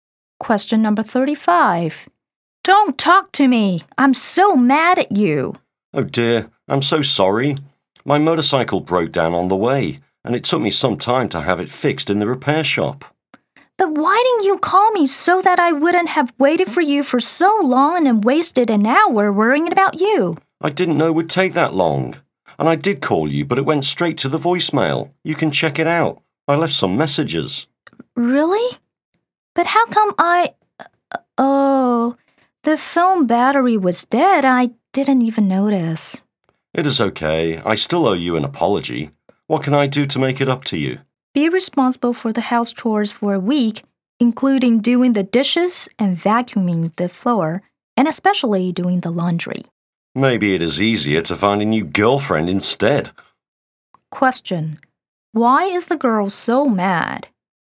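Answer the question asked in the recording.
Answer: The man was an hour late, and she thought he hadn't called her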